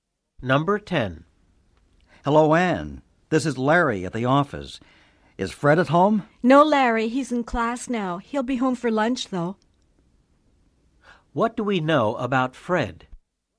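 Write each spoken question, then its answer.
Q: What do we know about Fred?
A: He is in class now and will be home for lunch.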